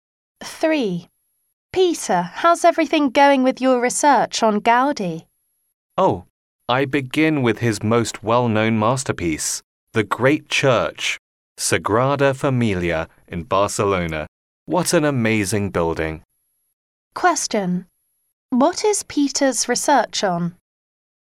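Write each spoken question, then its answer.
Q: What is Peter's research on?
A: Gaudi's architecture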